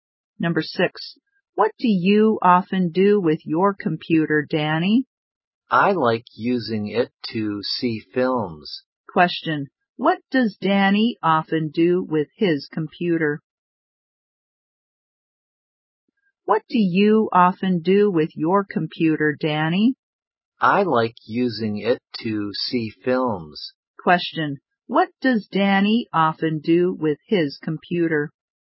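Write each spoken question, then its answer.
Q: Question, what does Danny often do with his computer?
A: He sees films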